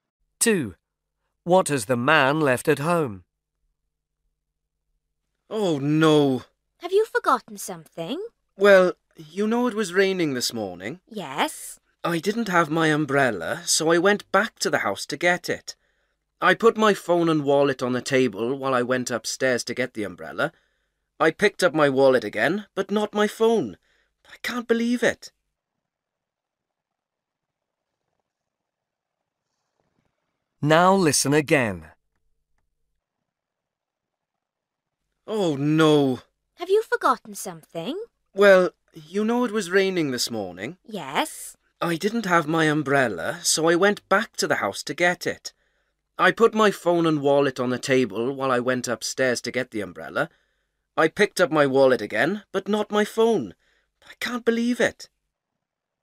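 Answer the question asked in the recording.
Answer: his phone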